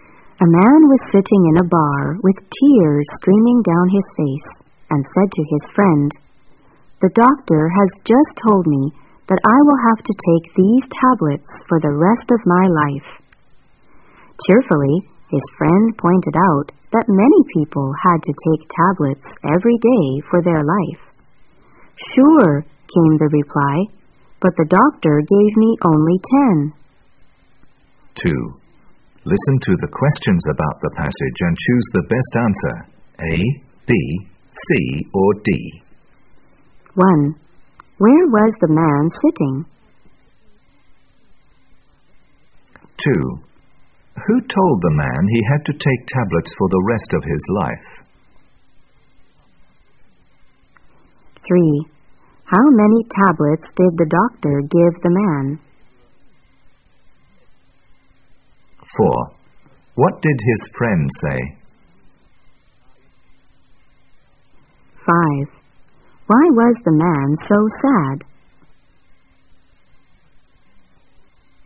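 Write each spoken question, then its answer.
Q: Where was the man sitting?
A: In a bar

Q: Who told the man he had to take tablets for the rest of his life?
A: The doctor

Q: How many tablets did the doctor give the man?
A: Only 10

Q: What did his friend say?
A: Many people had to take tablets every day for their life

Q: Why was the man so sad?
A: He had only 10 tablets, so he would die soon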